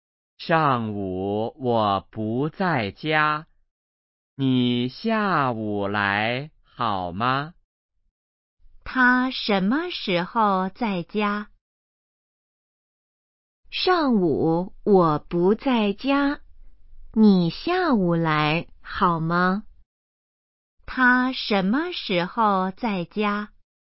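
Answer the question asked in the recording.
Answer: 下午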